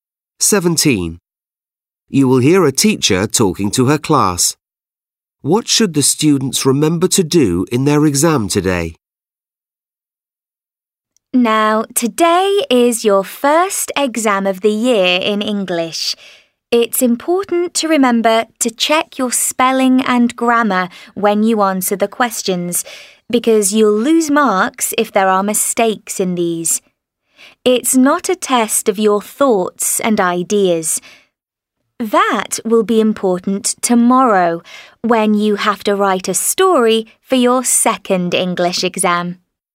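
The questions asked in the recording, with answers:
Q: What should the students remember to do in their exam today?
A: check their spelling and grammar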